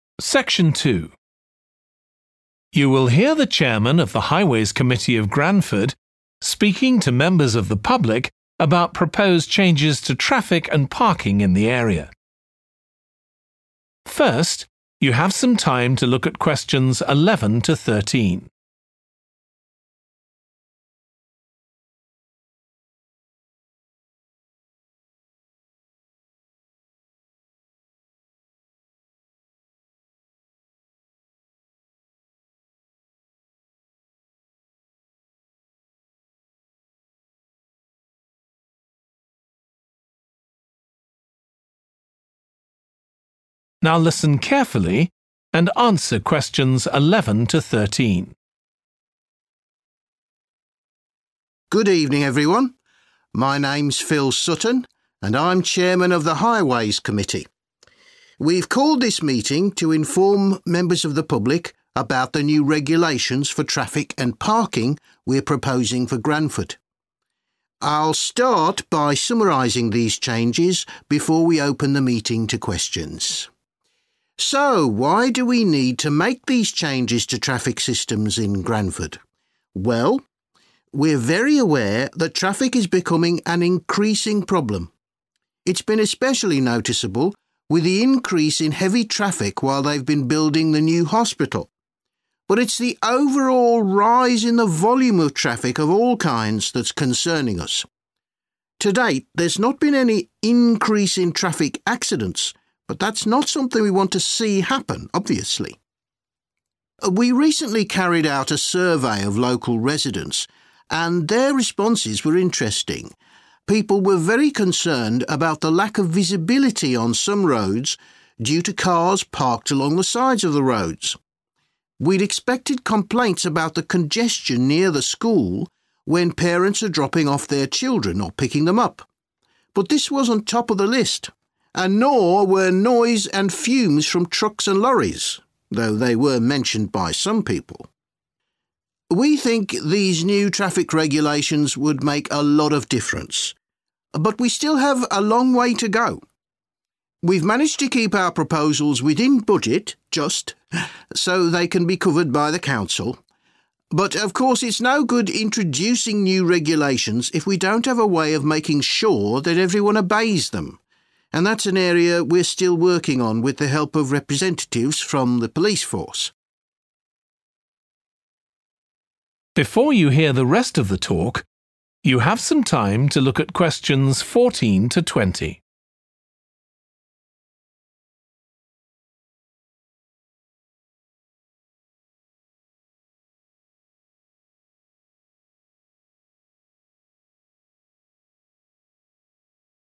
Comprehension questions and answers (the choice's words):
Choose the correct letter, A, B or C.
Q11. Why are changes needed to traffic systems in Granford?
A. The number of traffic accidents has risen.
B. The amount of traffic on the roads has increased.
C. The types of vehicles on the roads have changed.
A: The amount of traffic on the roads has increased.

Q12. In a survey, local residents particularly complained about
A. dangerous driving by parents.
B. pollution from trucks and lorries.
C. inconvenience from parked cars.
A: inconvenience from parked cars.

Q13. According to the speaker, one problem with the new regulations will be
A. raising money to pay for them.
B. finding a way to make people follow them.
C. getting the support of the police.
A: finding a way to make people follow them.

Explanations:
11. The correct answer is 'B' because the excerpt directly mentions 'the overall rise in the volume of traffic of all kinds,' which aligns with the answer choice describing an increase in the amount of traffic on the roads.
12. The correct answer is about inconvenience from parked cars because the excerpt mentions the concern of visibility issues on roads caused by cars parked along the sides. This aligns perfectly with the complaint of inconvenience due to parked cars.
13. The correct answer is 'B' because the excerpt highlights the importance of ensuring compliance with the new rules, implying a challenge in getting people to follow them.

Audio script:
Good evening everyone. My name's Phil Sutton, and I'm chairman of the Highways Committee. We've called this meeting to inform members of the public about the new regulations for traffic and parking we're proposing for Granford. I'll start by summarising these changes before we open the meeting to questions.
So, why do we need to make these changes to traffic systems in Granford? Well, we're very aware that traffic is becoming an increasing problem. It's been especially noticeable with the increase in heavy traffic while they've been building the new hospital. But it's the overall rise in the volume of traffic of all kinds that's concerning us. To date there's not been any increase in traffic accidents, but that's not something we want to see happen, obviously.
We recently carried out a survey of local residents, and their responses were interesting. People were very concerned about the lack of visibility on some roads due to cars parked along the sides of the roads. We'd expected complaints about the congestion near the school when parents are dropping off their children or picking them up, but this wasn't top of the list, and nor were noise and fumes from trucks and lorries, though they were mentioned by some people.
We think these new traffic regulations would make a lot of difference. But we still have a long way to go. We've managed to keep our proposals within budget, just, so they can be covered by the Council. But, of course, it's no good introducing new regulations if we don't have a way of making sure that everyone obeys them, and that's an area we're still working on with the help of representatives from the police force.